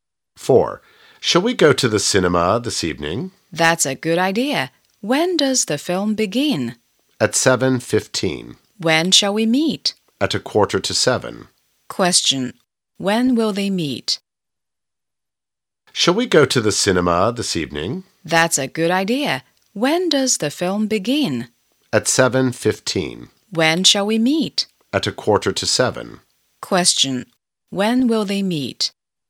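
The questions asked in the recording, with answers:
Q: When will they meet?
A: At 6:45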